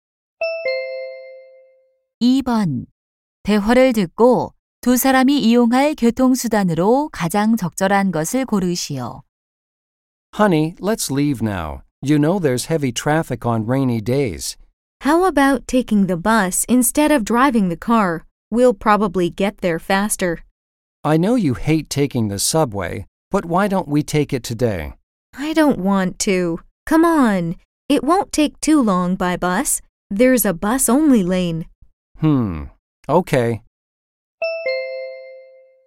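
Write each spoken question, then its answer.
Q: 대화를 듣고 두 사람이 이용할 교통수단으로 가장 적절한 것을 고르시오.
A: 버스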